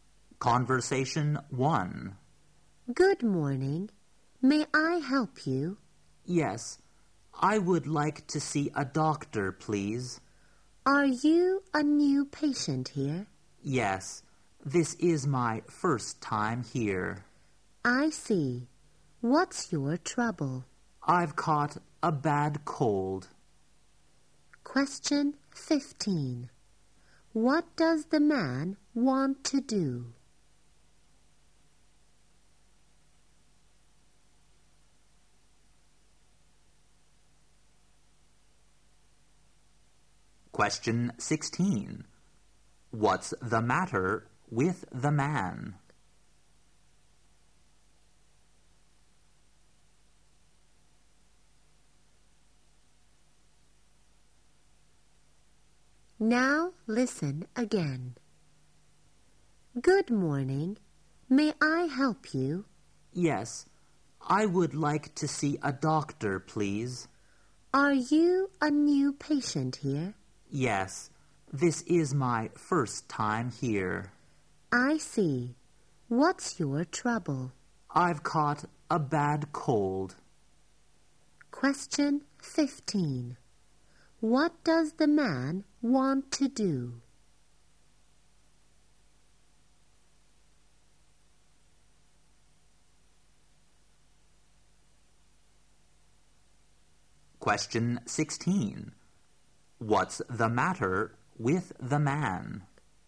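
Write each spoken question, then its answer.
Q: What does the man want to do?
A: See a doctor.

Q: What's the matter with the man?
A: He has caught a bad cold.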